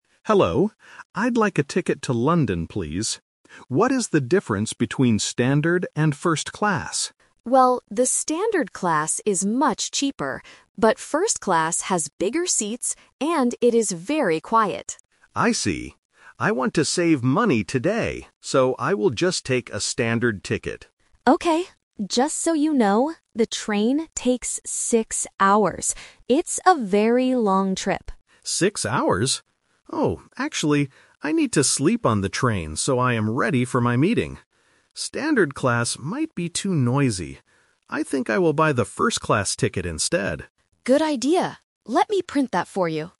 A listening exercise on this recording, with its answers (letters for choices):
Listen to the conversation and choose the correct answer (A, B, or C).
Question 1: What does the agent say about standard class?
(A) It is much cheaper.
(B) It is very quiet.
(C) It is much faster.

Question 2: What is special about first-class?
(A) It includes a free meal.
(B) The seats are bigger.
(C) It is much cheaper.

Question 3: Which ticket does the passenger buy in the end?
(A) A standard ticket, to save money.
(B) A first-class ticket, because he needs to sleep.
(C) He decides to take a bus instead.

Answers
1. A
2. B
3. B

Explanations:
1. The agent clearly says that "the standard class is much cheaper." Option B is a trap because being "very quiet" is a feature of first-class. Option C is a plausible guess for a train ride, but the speed of the trains is not mentioned.
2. The agent explains that "first-class has bigger seats." Option A is a plausible feature of first-class, but it is not mentioned in the audio. Option C is a trap because the standard class is the cheaper one.
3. This question uses the "Twist" technique. The passenger initially wants to buy a standard ticket to save money. However, when he learns the trip is six hours long, he changes his mind. He decides to buy the first-class ticket so he can sleep before his meeting. Option A is the main trap (his original plan). Option C is incorrect.

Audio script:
Passenger: Hello. I'd like a ticket to London, please. What is the difference between standard and first-class?
Agent: Well, the standard class is much cheaper. But first-class has bigger seats, and it is very quiet.
Passenger: I see. I want to save money today, so I will just take a standard ticket.
Agent: Okay. Just so you know, the train takes six hours. It's a very long trip.
Oh, actually... I need to sleep on the train so I am ready for my meeting. Standard class might be too noisy. I think I will buy the first-class ticket instead.